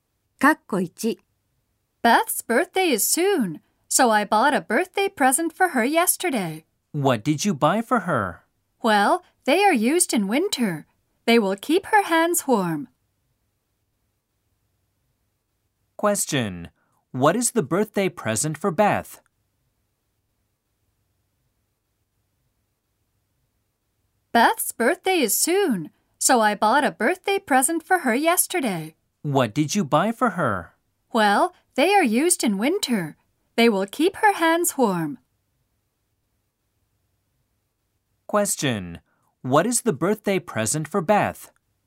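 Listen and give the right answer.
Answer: Gloves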